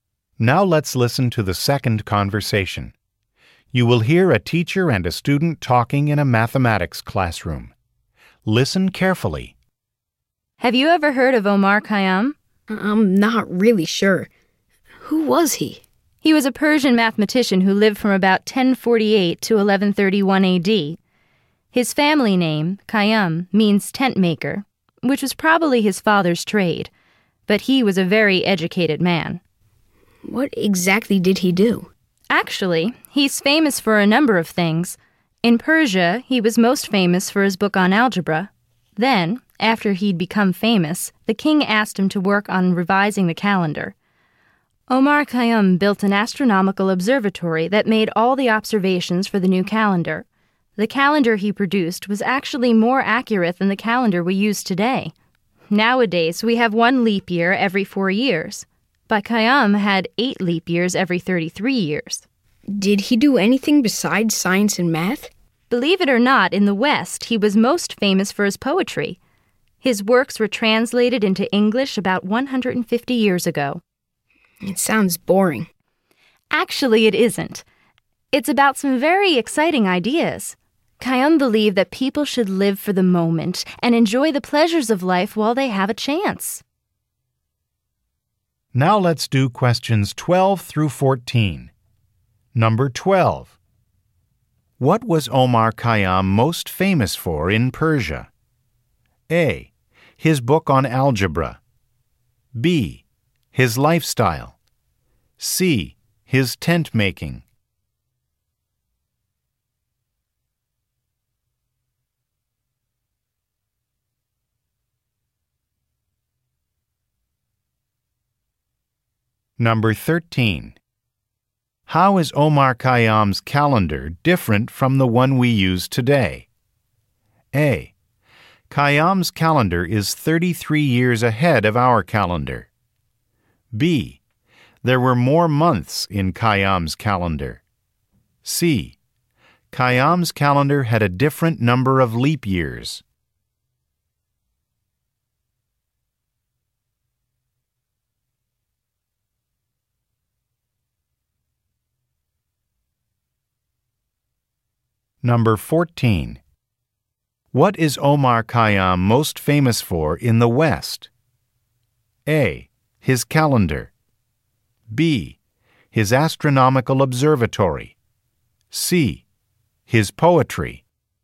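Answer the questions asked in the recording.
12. A: His book on algebra.
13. C: Khayyam's calendar had a different number of leap years.
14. C: His poetry.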